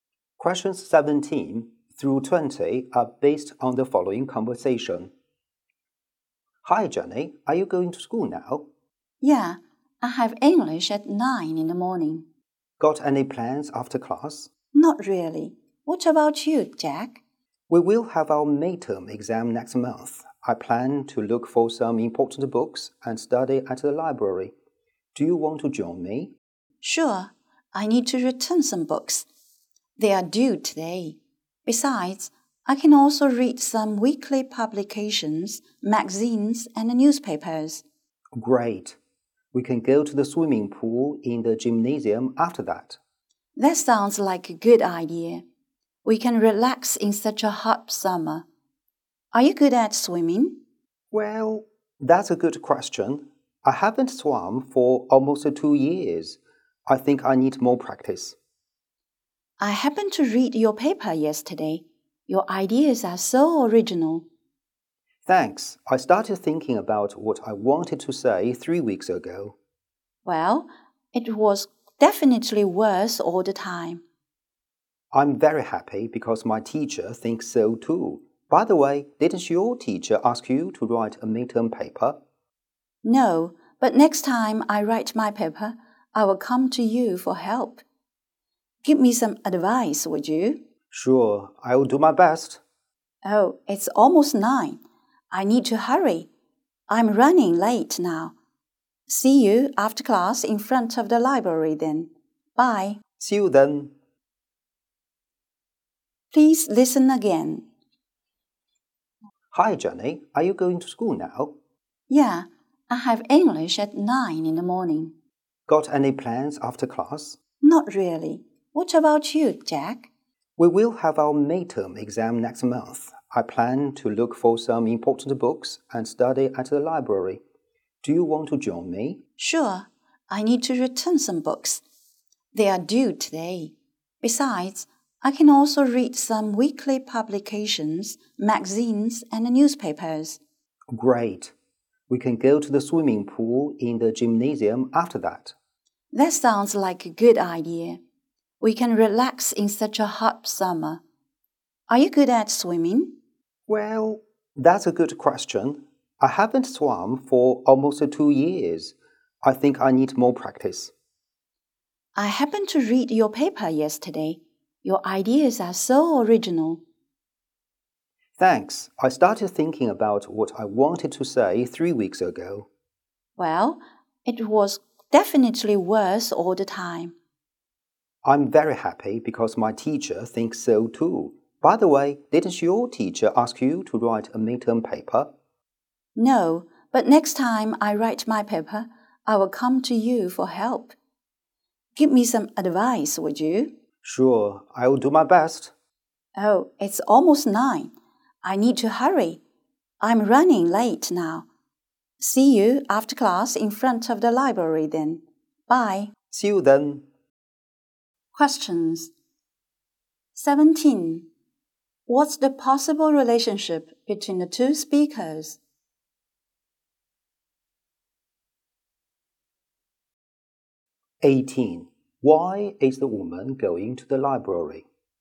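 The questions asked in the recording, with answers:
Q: Why is the woman going to the library?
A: To return some books and read magazines and newspapers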